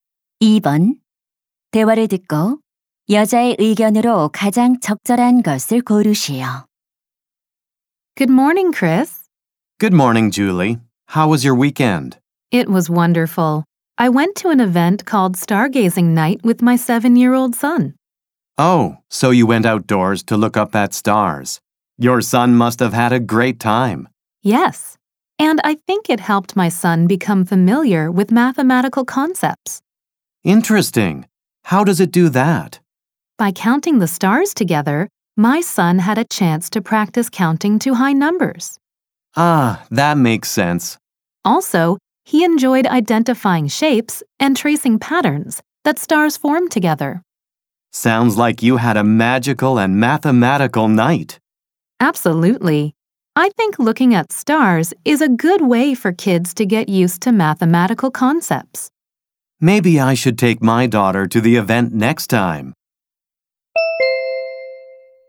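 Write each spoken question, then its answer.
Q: 대화를 듣고 여자의 의견으로 가장 적절한 것을 고르시오.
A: 별 관찰은 아이들이 수학 개념에 익숙해지는 데 도움이 된다.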